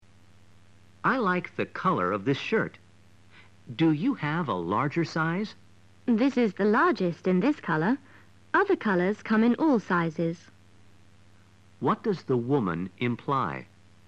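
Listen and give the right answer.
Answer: There is no larger size in this color, but he could choose another color.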